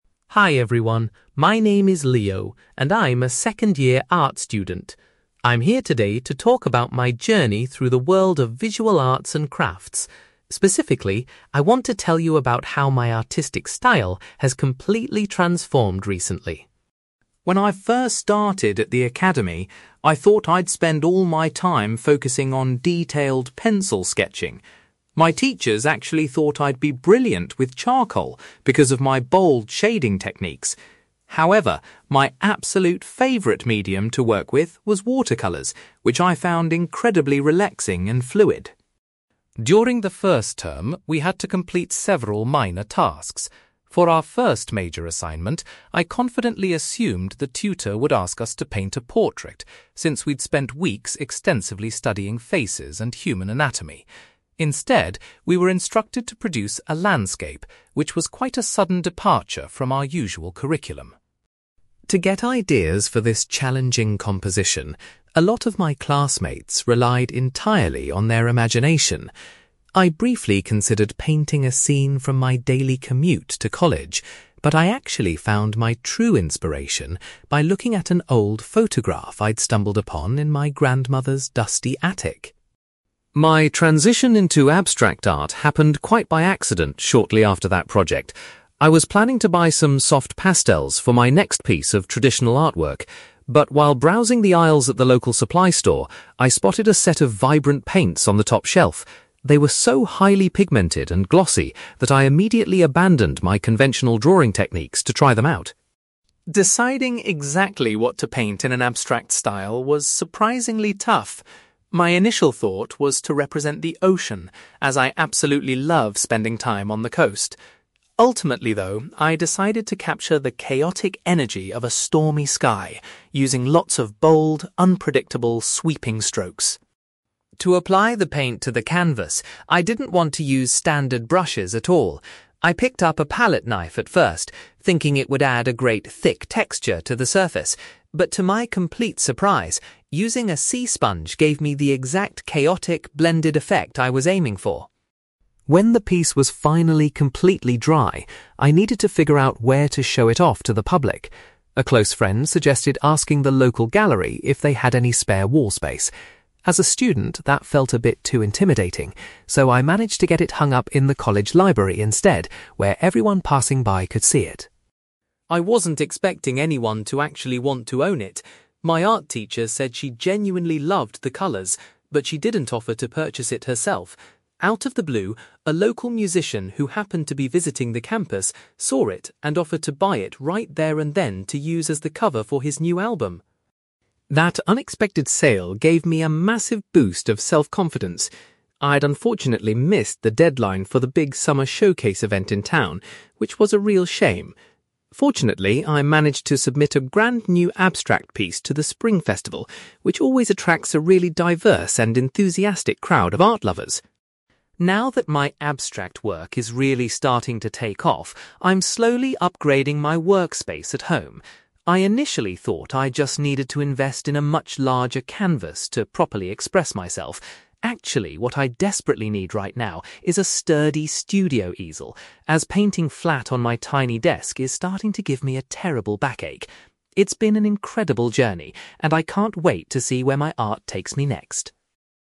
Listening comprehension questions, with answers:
You will hear an art student called Leo talking about his transition into abstract art. For questions 9-18, complete the sentences with a word or short phrase.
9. Initially, Leo enjoyed working with (9)........................... more than other materials.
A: watercolours

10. Leo's class were asked to focus on a (10)........................... for their first major project.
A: landscape

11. Leo used an (11)........................... to give him ideas for his artwork.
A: old photograph

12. Leo was inspired to try abstract art after discovering some (12)........................... in a shop.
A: vibrant paints

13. Leo chose to represent a (13)........................... in his first abstract painting.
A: stormy sky

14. Instead of traditional tools, Leo used a (14)........................... to create texture on the canvas.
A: sea sponge

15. Leo's finished abstract painting was first exhibited in the (15)........................... .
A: college library

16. To Leo's surprise, his painting was purchased by a (16)........................... .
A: local musician

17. Leo later submitted a new piece of art to an event called the (17)........................... .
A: Spring Festival

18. Leo has decided that he needs to purchase a (18)........................... to improve his workspace.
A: studio easel

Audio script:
Leo: Hi everyone, my name is Leo, and I'm a second-year art student. I'm here today to talk about my journey through the world of visual arts and crafts. Specifically, I want to tell you about how my artistic style has completely transformed recently.
When I first started at the academy, I thought I'd spend all my time focusing on detailed pencil sketching. My teachers actually thought I'd be brilliant with charcoal because of my bold shading techniques. However, my absolute favourite medium to work with was watercolours, which I found incredibly relaxing and fluid.
During the first term, we had to complete several minor tasks. For our first major assignment, I confidently assumed the tutor would ask us to paint a portrait, since we'd spent weeks extensively studying faces and human anatomy. Instead, we were instructed to produce a landscape, which was quite a sudden departure from our usual curriculum.
To get ideas for this challenging composition, a lot of my classmates relied entirely on their imagination. I briefly considered painting a scene from my daily commute to college, but I actually found my true inspiration by looking at an old photograph I'd stumbled upon in my grandmother's dusty attic.
My transition into abstract art happened quite by accident shortly after that project. I was planning to buy some soft pastels for my next piece of traditional artwork. But while browsing the aisles at the local supply store, I spotted a set of vibrant paints on the top shelf. They were so highly pigmented and glossy that I immediately abandoned my conventional drawing techniques to try them out.
Deciding exactly what to paint in an abstract style was surprisingly tough. My initial thought was to represent the ocean, as I absolutely love spending time on the coast. Ultimately, though, I decided to capture the chaotic energy of a stormy sky, using lots of bold, unpredictable, sweeping strokes.
To apply the paint to the canvas, I didn't want to use standard brushes at all. I picked up a palette knife at first, thinking it would add a great, thick texture to the surface. But to my complete surprise, using a sea sponge gave me the exact chaotic, blended effect I was aiming for.
When the piece was finally completely dry, I needed to figure out where to show it off to the public. A close friend suggested asking the local gallery if they had any spare wall space. As a student, that felt a bit too intimidating, so I managed to get it hung up in the college library instead, where everyone passing by could see it.
I wasn't expecting anyone to actually want to own it. My art teacher said she genuinely loved the colours, but she didn't offer to purchase it herself. Out of the blue, a local musician who happened to be visiting the campus saw it and offered to buy it right there and then to use as the cover for his new album!
That unexpected sale gave me a massive boost of self-confidence. I'd unfortunately missed the deadline for the big Summer Showcase event in town, which was a real shame. Fortunately, I managed to submit a brand-new abstract piece to the Spring Festival, which always attracts a really diverse and enthusiastic crowd of art lovers.
Now that my abstract work is really starting to take off, I'm slowly upgrading my workspace at home. I initially thought I just needed to invest in a much larger canvas to properly express myself. Actually, what I desperately need right now is a sturdy studio easel, as painting flat on my tiny desk is starting to give me a terrible backache. It's been an incredible journey, and I can't wait to see where my art takes me next.

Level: B2